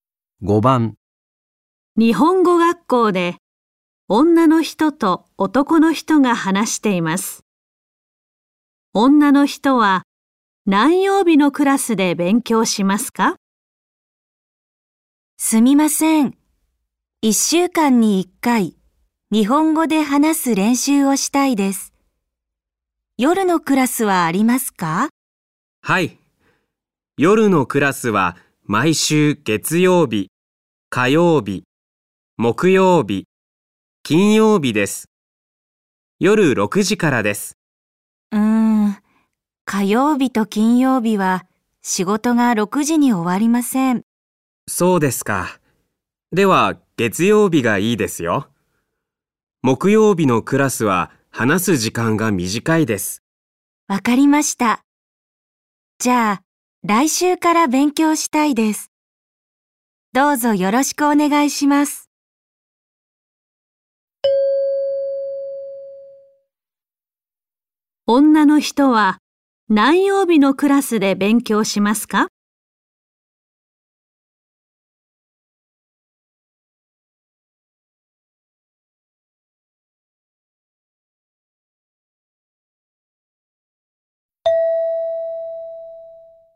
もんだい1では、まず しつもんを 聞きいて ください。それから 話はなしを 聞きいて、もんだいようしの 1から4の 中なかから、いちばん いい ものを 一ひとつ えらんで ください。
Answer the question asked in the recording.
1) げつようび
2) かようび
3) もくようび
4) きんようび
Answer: 1) げつようび

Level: N5 Listening · Test 1